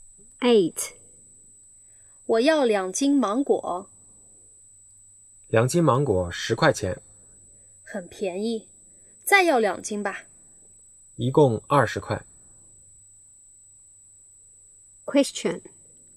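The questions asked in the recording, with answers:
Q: 女的买多少斤芒果?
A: 四斤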